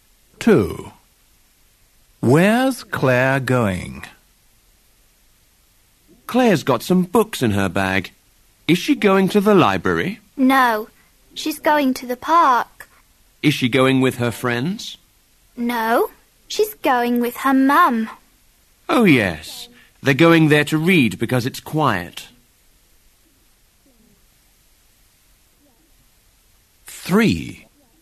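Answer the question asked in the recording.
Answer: to the park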